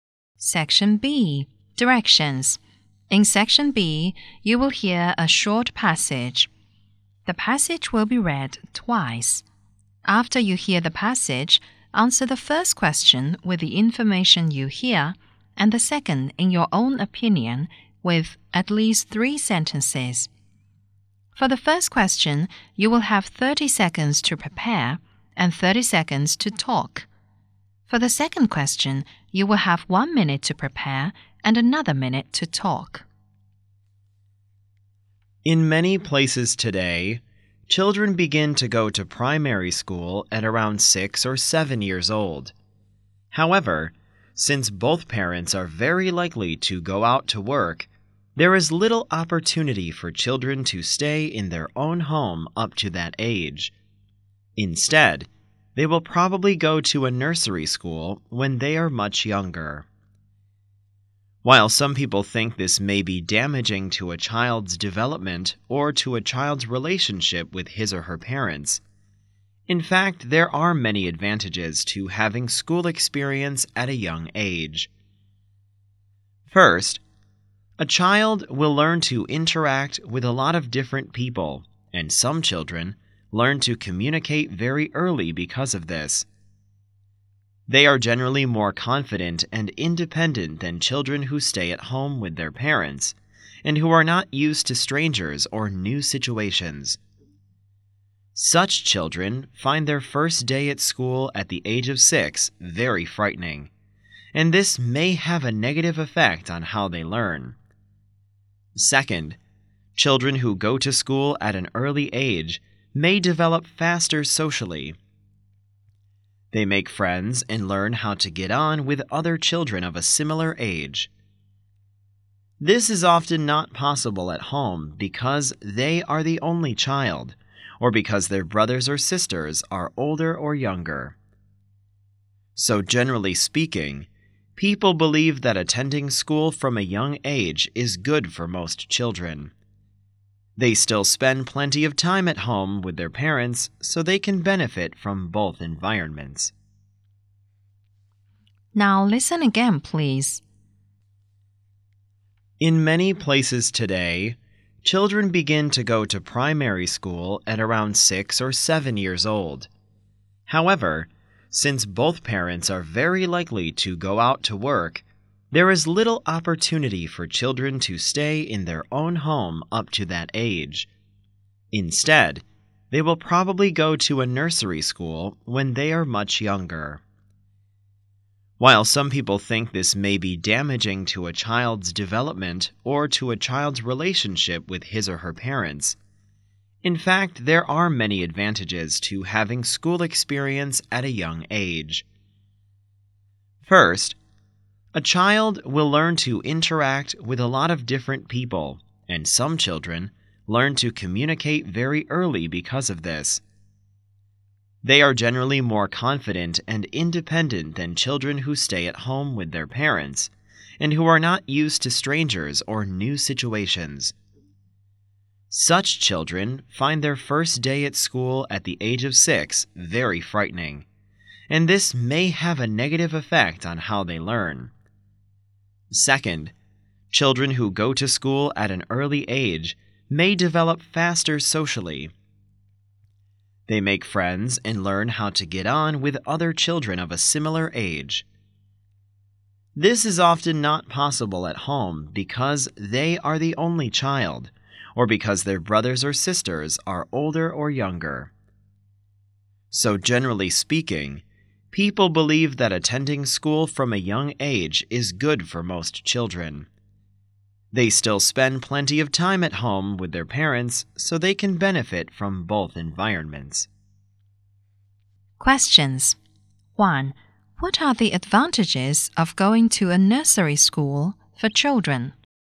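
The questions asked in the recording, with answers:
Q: What are the advantages of going to a nursery school for children?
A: Children learn to interact with many different people, becoming more confident and independent, and they develop faster socially by making friends with children of a similar age.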